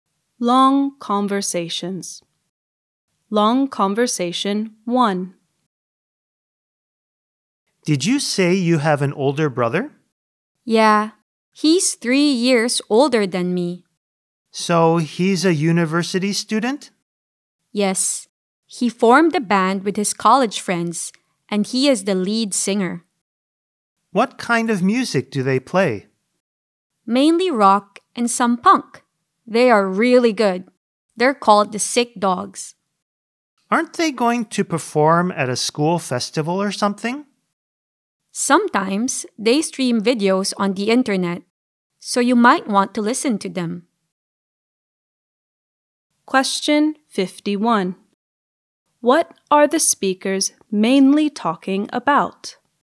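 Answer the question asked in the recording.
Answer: The older brother's band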